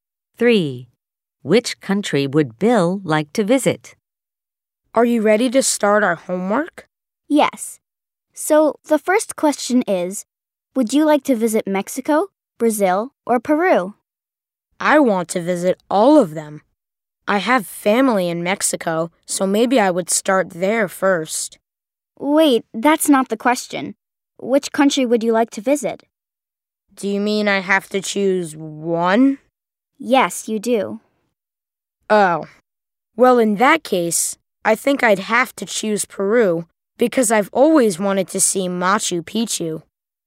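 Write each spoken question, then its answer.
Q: Which country would Bill like to visit?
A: Peru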